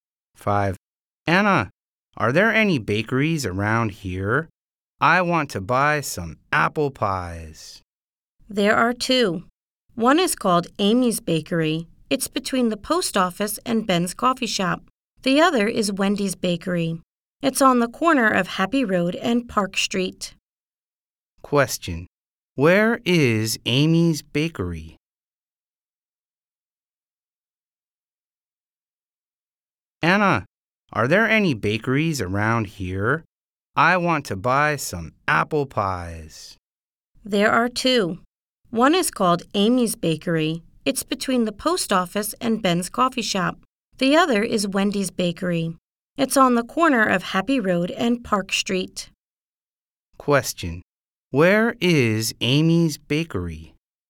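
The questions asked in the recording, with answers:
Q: Where is Amy's Bakery?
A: Between the post office and Ben's Coffee Shop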